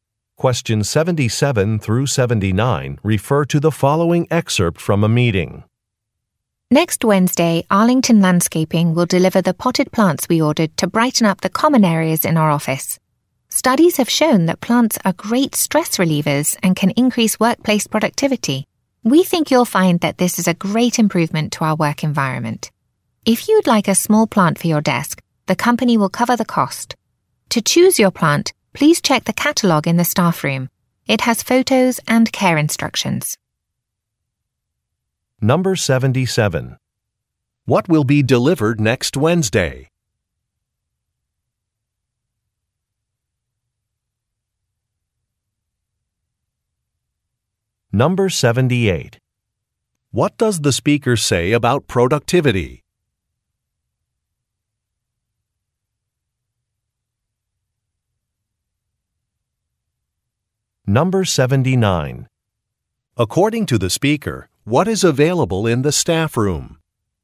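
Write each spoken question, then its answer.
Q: What will be delivered next Wednesday?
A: Potted plants

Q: What does the speaker say about productivity?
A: Plants can increase workplace productivity

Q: According to the speaker, what is available in the staff room?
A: A plant catalogue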